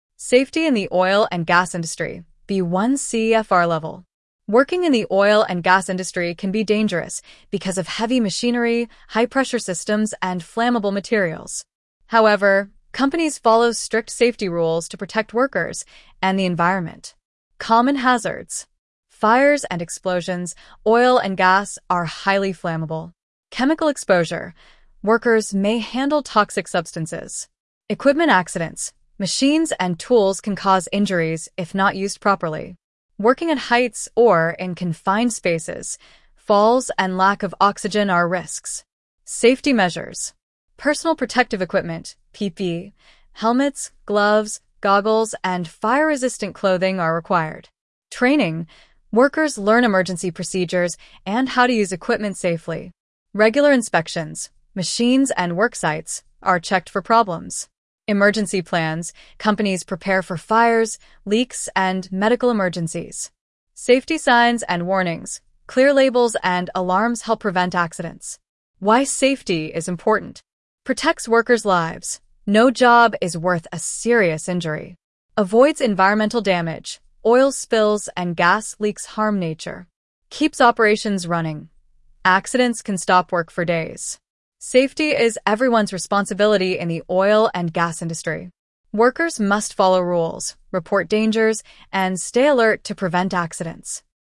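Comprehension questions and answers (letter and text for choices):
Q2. According to the audio that you listened to, what is an example of PPE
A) A file holder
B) A helmet, gloves, and goggles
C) A backpack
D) A smartphone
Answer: B) A helmet, gloves, and goggles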